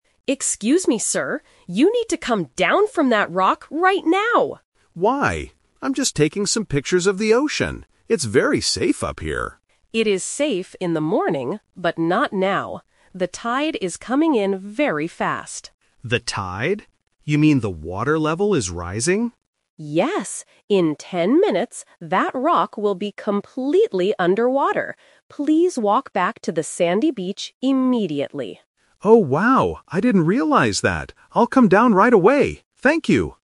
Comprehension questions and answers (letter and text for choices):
Listen to the conversation between a beach lifeguard and a tourist. Choose the correct answer (A, B, or C) for each question.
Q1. What is the tourist doing on the rock?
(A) He is fishing.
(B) He is taking pictures.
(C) He is sleeping.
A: (B) He is taking pictures.

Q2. Why does the lifeguard tell the man to leave the rock?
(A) The water level is rising fast.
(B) The beach is closing for the day.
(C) The rock is breaking apart.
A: (A) The water level is rising fast.

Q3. Where should the tourist go to be safe?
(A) To a taller rock.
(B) To the lifeguard station.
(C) To the sandy beach.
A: (C) To the sandy beach.

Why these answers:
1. Why B is correct: The tourist explains his action: "I'm just taking some pictures of the ocean." Why A & C are wrong: Fishing and sleeping are never mentioned in the conversation.
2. Why A is correct: The lifeguard says "The tide is coming in very fast," and confirms when the tourist asks if "the water level is rising." Why B & C are wrong: The audio does not mention the beach closing or the rock breaking. Note on A2 Trap: The tourist says "It's very safe up here," and the lifeguard agrees it is safe in the morning, but uses the contrast "but not now" to show the current danger.
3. Why C is correct: The lifeguard gives a direct instruction: "Please walk back to the sandy beach immediately." Why A is a trap: Moving to a taller rock might seem like a logical guess to escape the water, but it is not what the lifeguard tells him to do. Why B is wrong: The lifeguard station is not mentioned as the place to go.

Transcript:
Lifeguard (Woman): Excuse me, sir! You need to come down from that rock right now!
Tourist (Man): Why? I'm just taking some pictures of the ocean. It's very safe up here.
Lifeguard: It is safe in the morning, but not now. The tide is coming in very fast.
Tourist: The tide? You mean the water level is rising?
Lifeguard: Yes! In ten minutes, that rock will be completely under water. Please walk back to the sandy beach immediately.
Tourist: Oh, wow. I didn't realize that. I'll come down right away. Thank you!